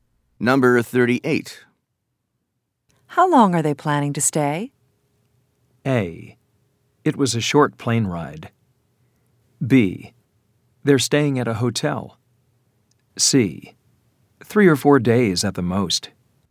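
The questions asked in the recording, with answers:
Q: How long are they planning to stay?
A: C: 3 or 4 days at the most.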